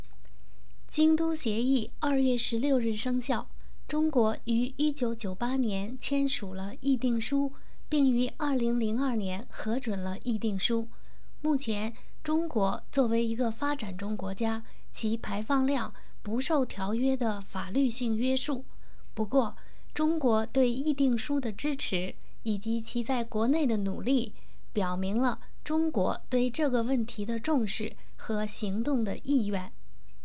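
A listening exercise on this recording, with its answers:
Please answer the following questions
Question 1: What is signified in China's signing the Kyoto Protocol?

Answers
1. It shows that China takes the issue seriously and is willing to act on it.

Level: M.Phil Year 2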